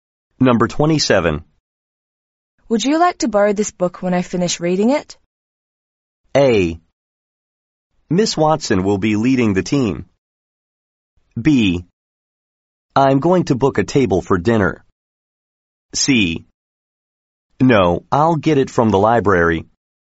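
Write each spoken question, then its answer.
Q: Would you like to borrow this book when I finish reading it?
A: C: No, I'll get it from the library.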